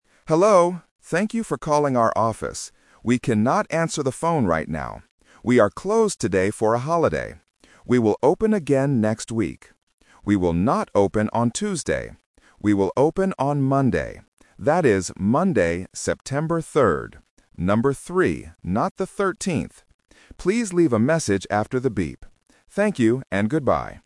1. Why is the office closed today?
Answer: It is a holiday

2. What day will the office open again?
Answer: Monday

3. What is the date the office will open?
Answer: September 3rd

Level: A1